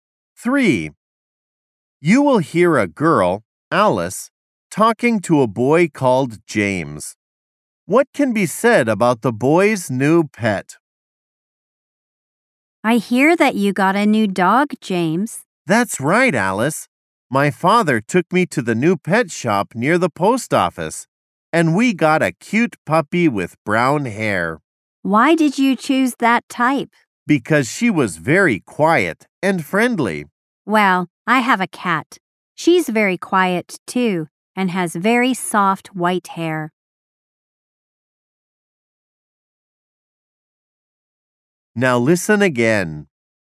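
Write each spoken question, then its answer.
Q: What can be said about the boy's new pet?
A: It is a quiet, friendly puppy with brown hair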